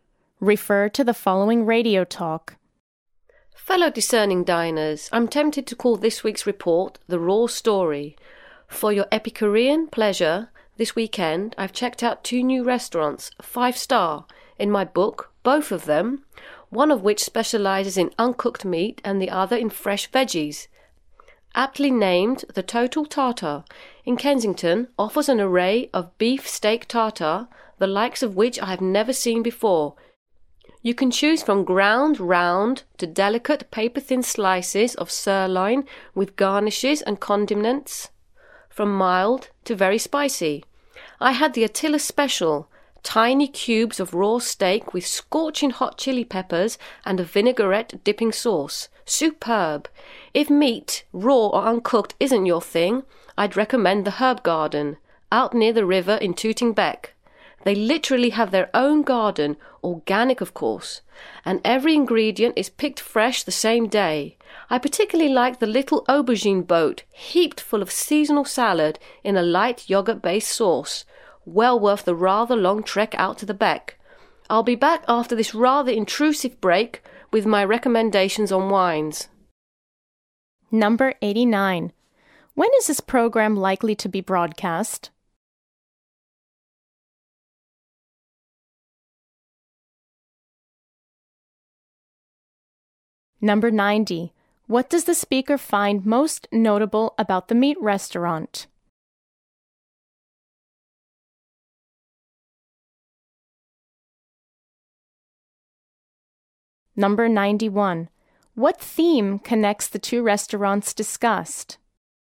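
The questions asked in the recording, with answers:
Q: What theme connects the two restaurants discussed?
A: Both serve raw, uncooked food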